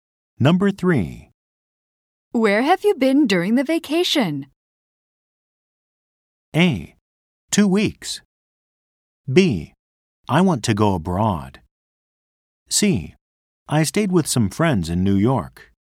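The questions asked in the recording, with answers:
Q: Where have you been during the vacation?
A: C: I stayed with some friends in New York.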